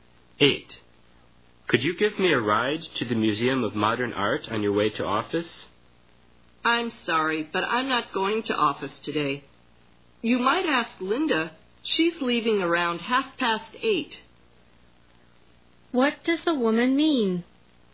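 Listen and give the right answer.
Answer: She can't give him a ride; he should ask Linda.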